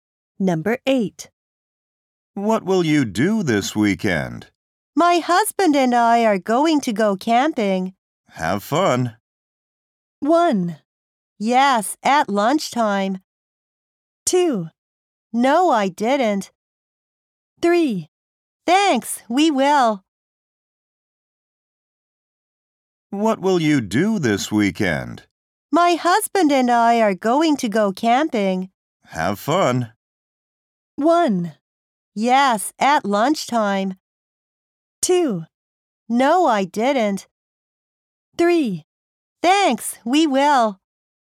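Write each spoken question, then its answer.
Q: Have fun.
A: 3: Thanks, we will.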